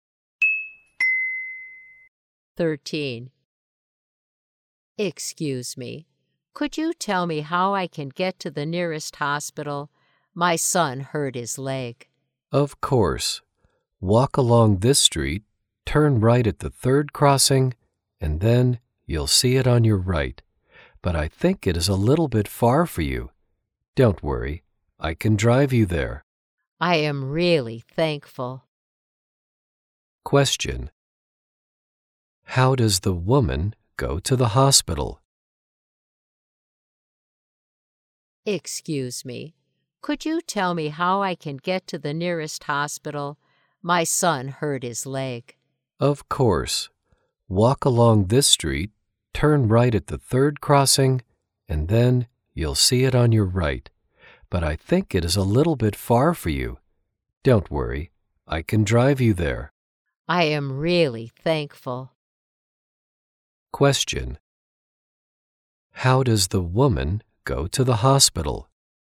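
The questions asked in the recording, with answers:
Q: How does the woman go to the hospital?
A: By car.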